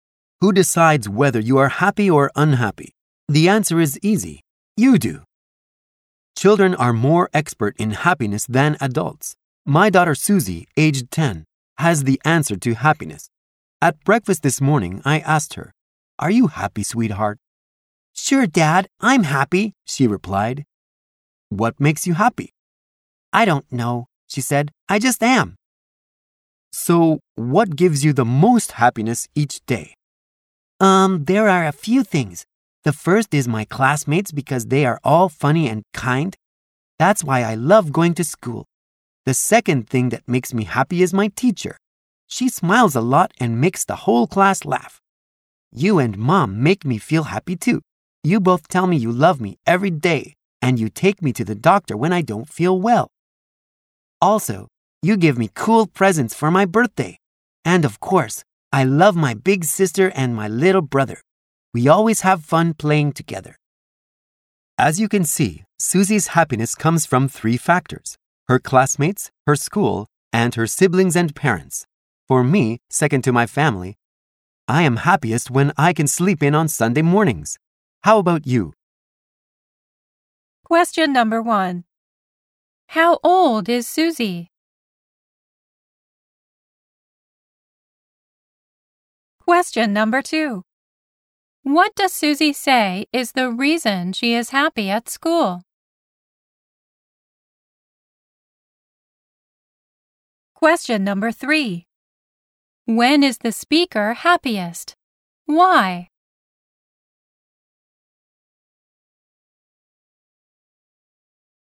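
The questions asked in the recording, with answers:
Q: How old is Susie?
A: She is ten years old.

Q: What does Susie say is the reason she is happy at school?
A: Her classmates are funny and kind, and her teacher smiles a lot and makes the class laugh.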